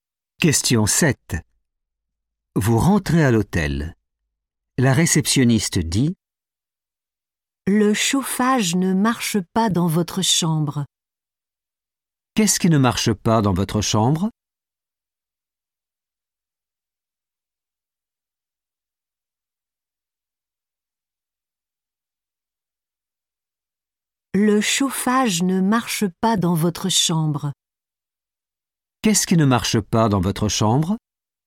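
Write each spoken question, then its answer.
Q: Qu'est-ce qui ne marche pas dans votre chambre?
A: le chauffage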